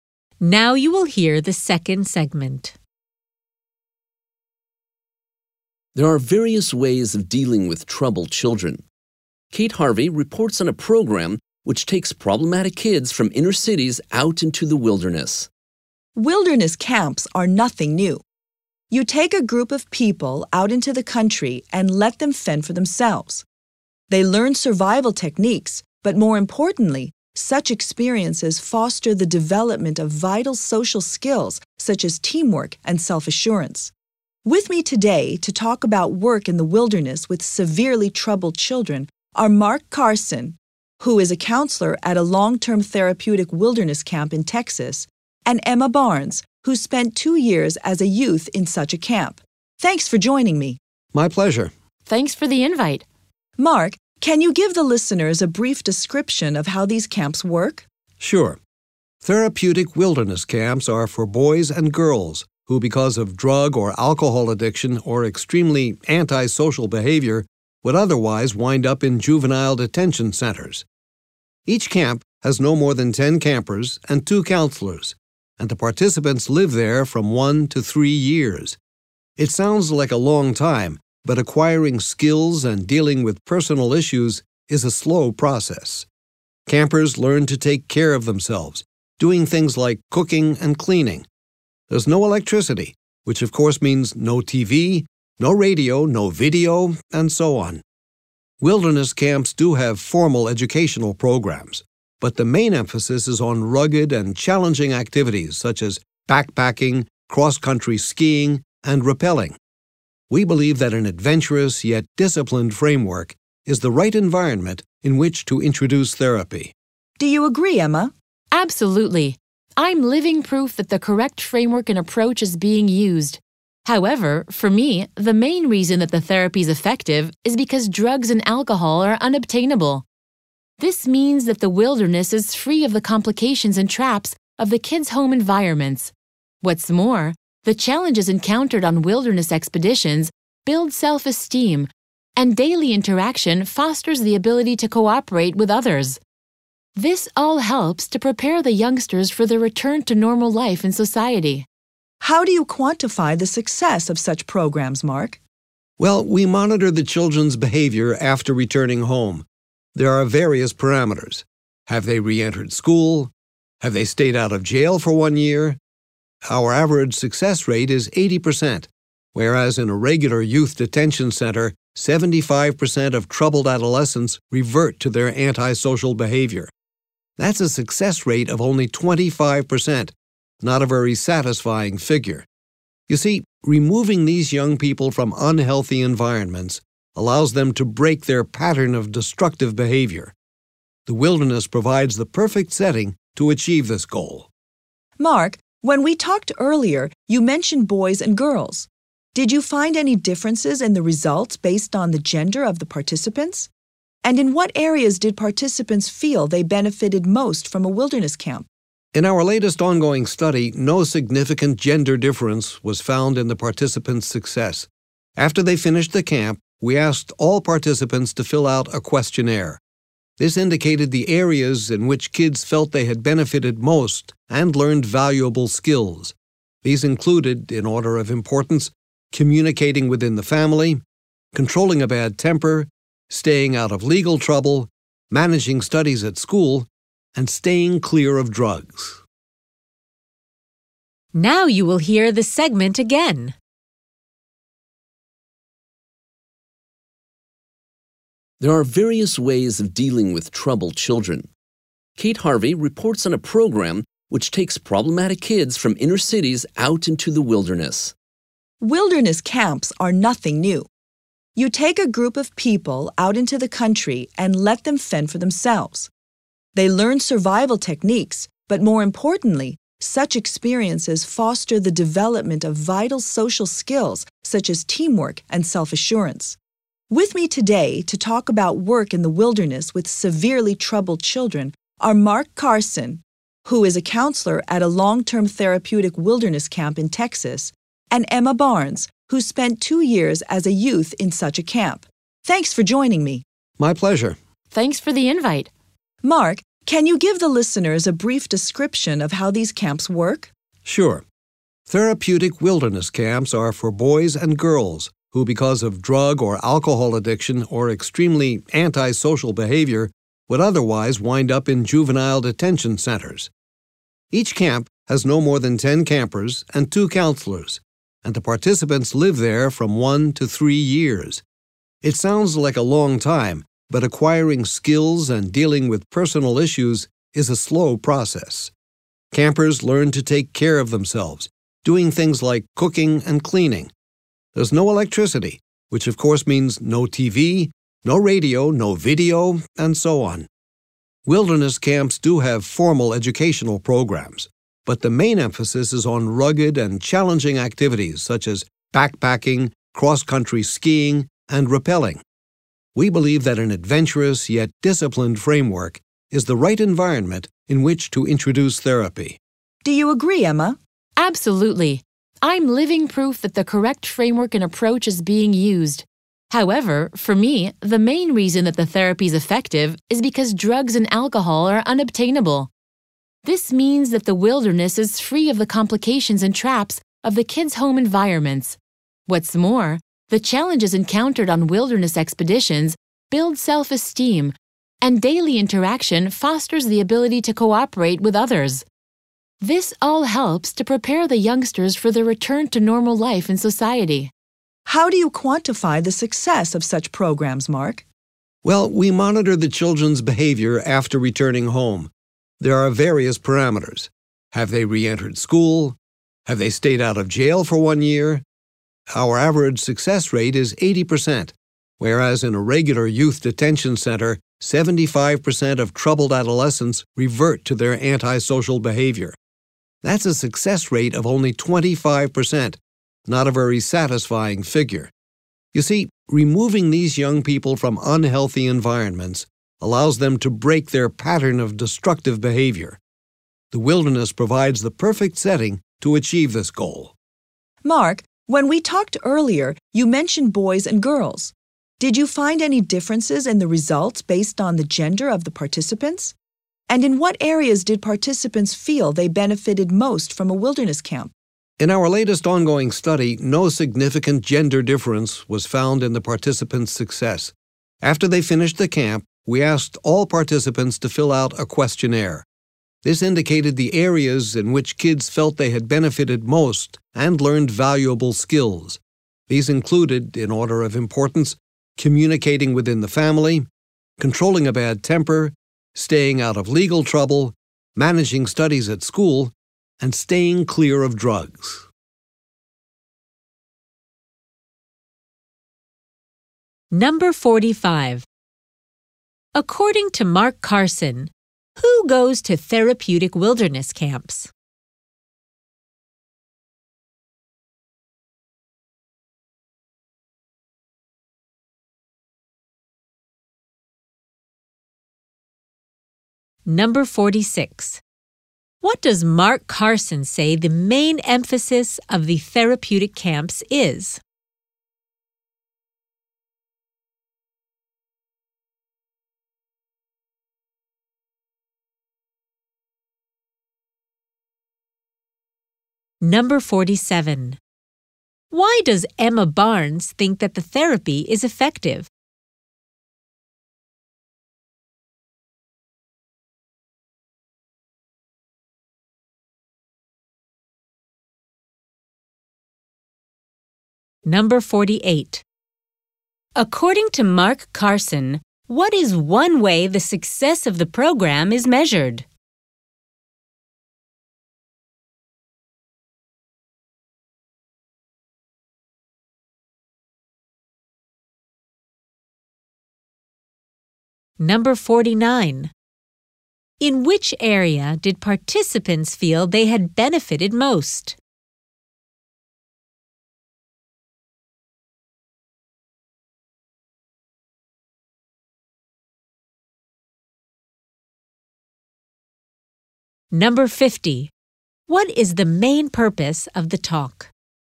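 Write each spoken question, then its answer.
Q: According to Mark Carson, who goes to therapeutic wilderness camps?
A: Children with drug or alcohol addiction or very antisocial behavior who would otherwise go to juvenile detention

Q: What does Mark Carson say the main emphasis of the therapeutic camps is?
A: Rugged, challenging activities such as backpacking, cross-country skiing and rappelling

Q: Why does Emma Barnes think that the therapy is effective?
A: Because campers cannot get drugs or alcohol

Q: What is one way the success of the program is measured?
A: Whether the children go back to school or stay out of jail for a year

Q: In which area did participants feel they had benefited most?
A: Communicating within the family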